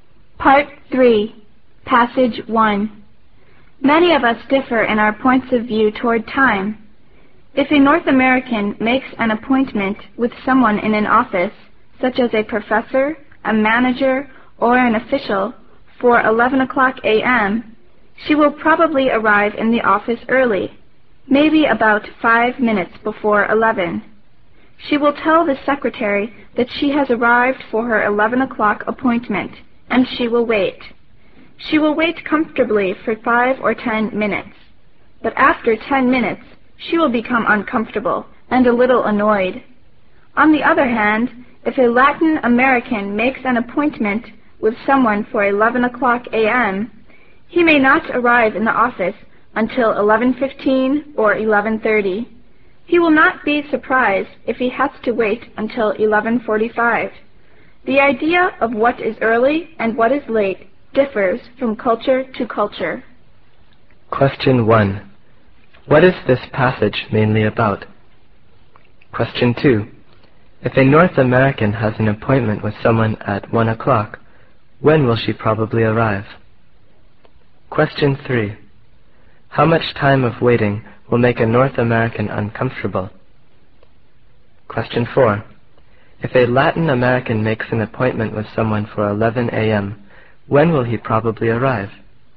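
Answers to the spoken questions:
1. Different cultural views of time (being early or late)
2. About 5 minutes early, around 12:55
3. More than 10 minutes
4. At 11:15 or 11:30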